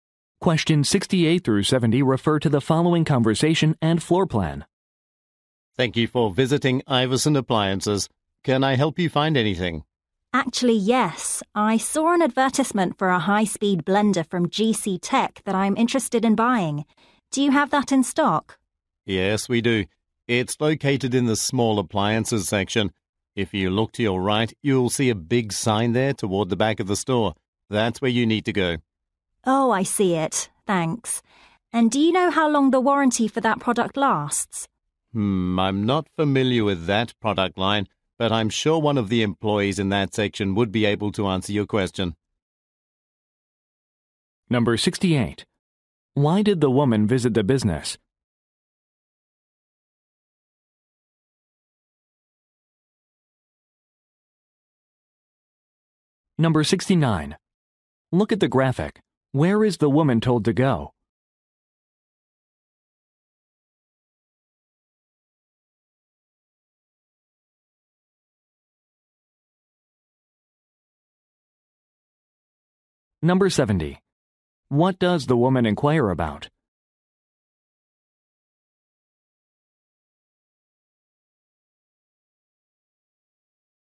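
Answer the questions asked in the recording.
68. To buy a blender
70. The product's warranty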